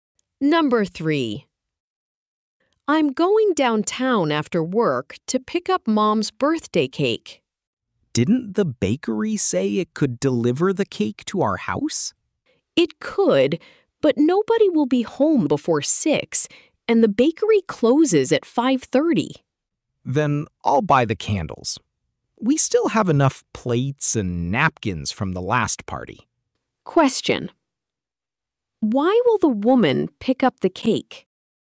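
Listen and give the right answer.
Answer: Nobody will be home before 6 and the bakery closes at 5:30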